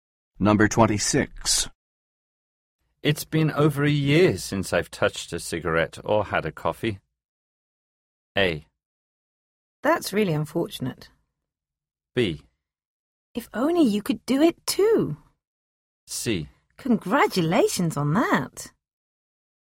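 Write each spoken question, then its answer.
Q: It's been over a year since I've touched a cigarette or had a coffee.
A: C: Congratulations on that.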